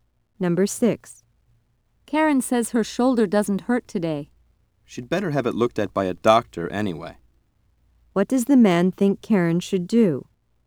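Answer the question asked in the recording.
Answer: Have a doctor look at her shoulder.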